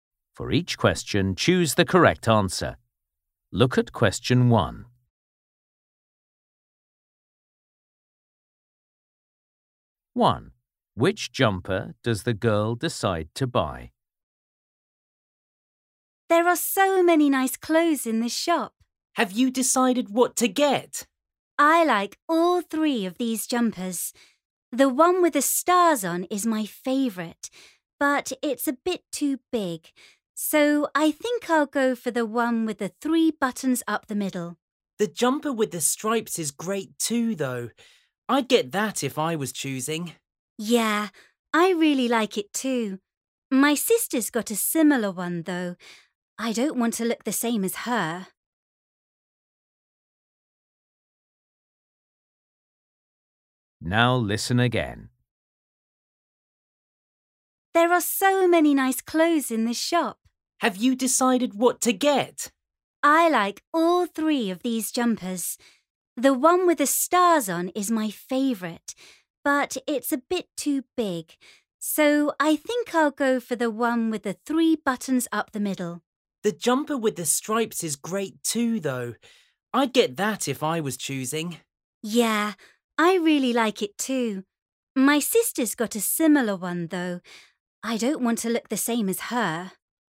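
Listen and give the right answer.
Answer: the one with three buttons up the middle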